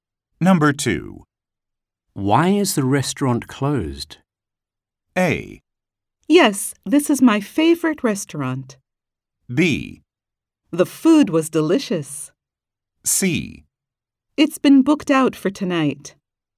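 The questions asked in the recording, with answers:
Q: Why is the restaurant closed?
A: C: It's been booked out for tonight.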